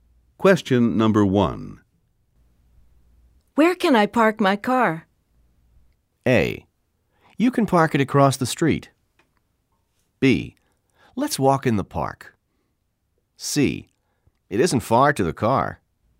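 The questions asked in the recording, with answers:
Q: Where can I park my car?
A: A: You can park it across the street.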